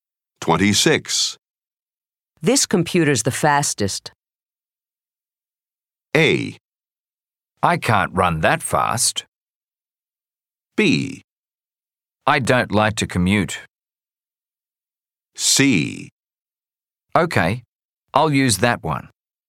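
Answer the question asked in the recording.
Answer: C: Okay, I'll use that one.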